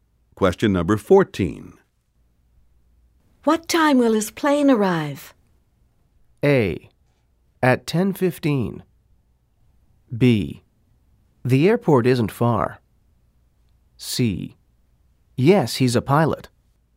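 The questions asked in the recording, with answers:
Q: What time will his plane arrive?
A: A: At 10:15.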